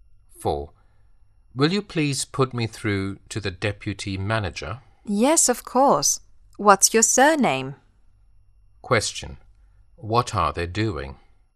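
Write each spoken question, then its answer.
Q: What are they doing?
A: Making a phone call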